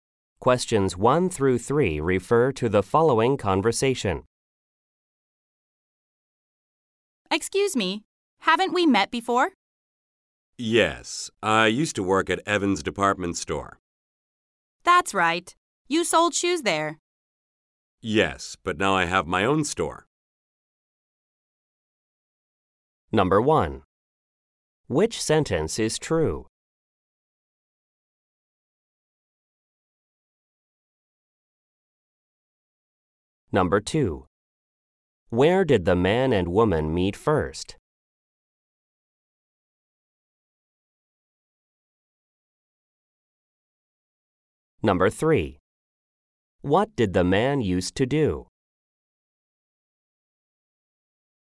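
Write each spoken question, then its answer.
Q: Where did the man and woman meet first?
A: At Evans Department Store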